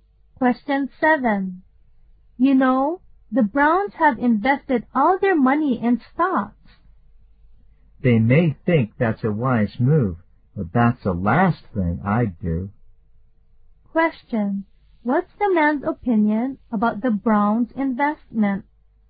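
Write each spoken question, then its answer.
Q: What's the man's opinion about the Browns' investment?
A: It is unwise; he would never do it.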